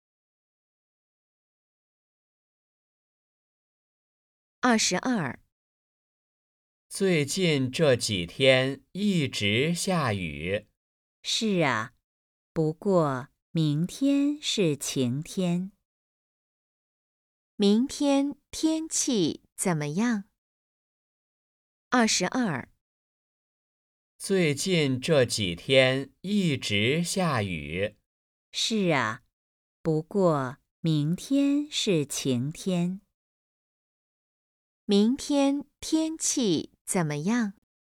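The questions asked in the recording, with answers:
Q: 明天天气怎么样?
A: 晴天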